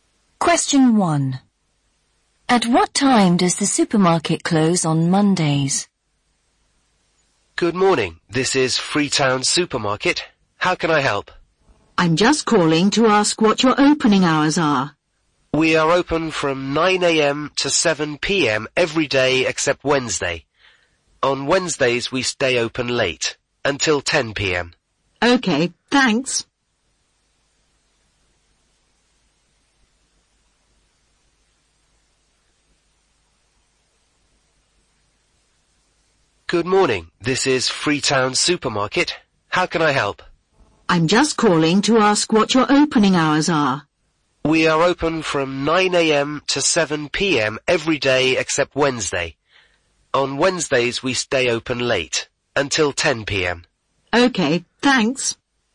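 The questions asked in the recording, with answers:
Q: At what time does the supermarket close on Mondays?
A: 7 p.m.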